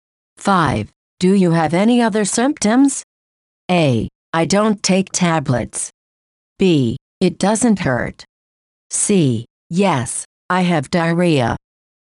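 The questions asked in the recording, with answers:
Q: Do you have any other symptoms?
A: C: Yes, I have diarrhea.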